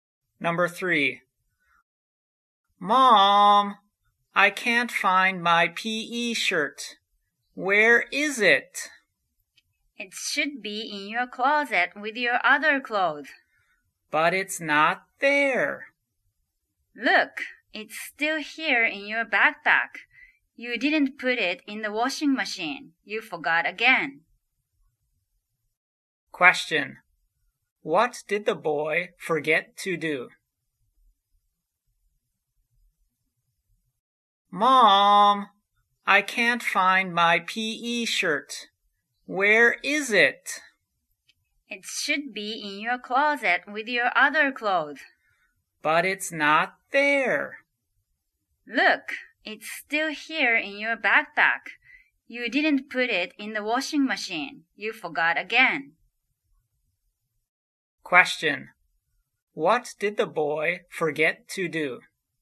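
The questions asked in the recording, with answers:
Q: What did the boy forget to do?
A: Put his PE shirt in the washing machine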